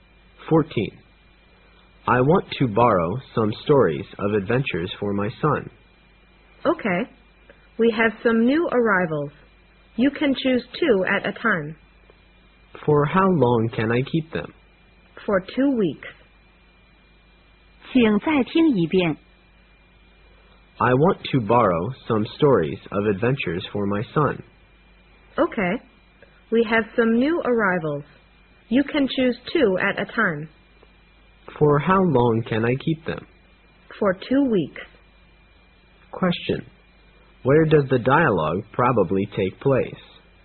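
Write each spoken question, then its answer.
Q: Where does the dialogue probably take place?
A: In a library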